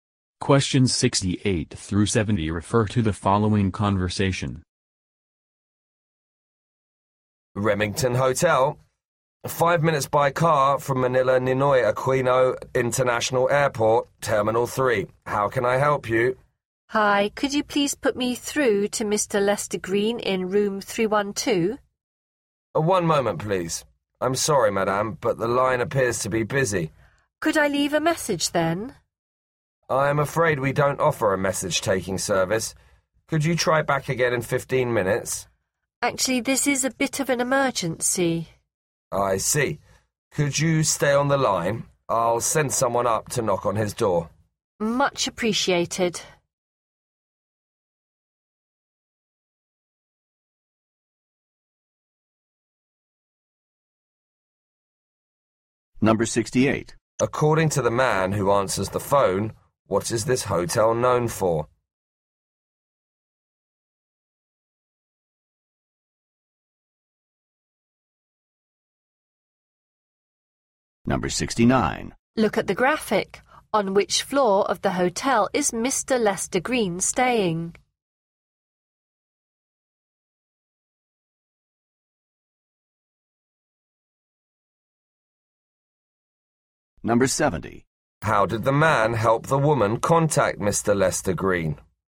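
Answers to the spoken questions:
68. Being 5 minutes by car from the airport (Terminal 3)
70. He sent someone up to knock on his door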